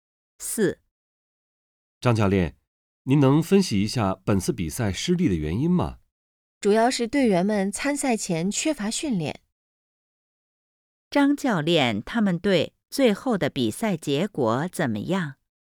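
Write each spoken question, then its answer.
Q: 张教练,他们队最后的比赛结果怎么样?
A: 比赛失利了(输了)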